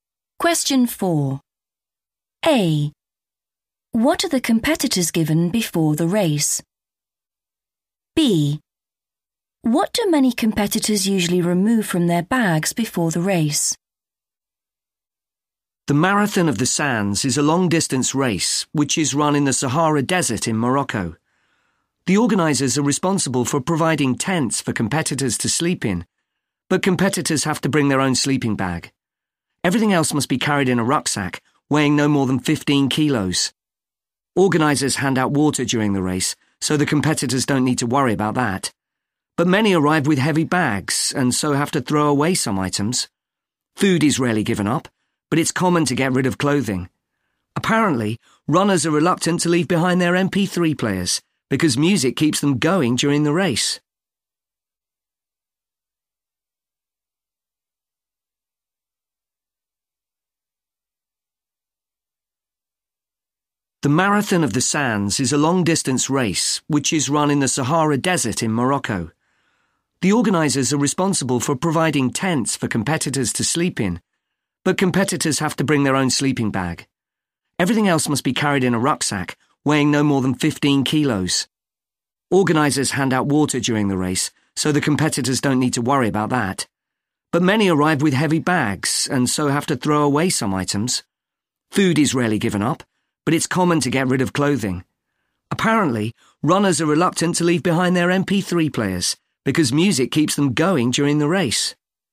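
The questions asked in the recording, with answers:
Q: What are the competitors given before the race?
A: tents

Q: What do many competitors usually remove from their bags before the race?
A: clothing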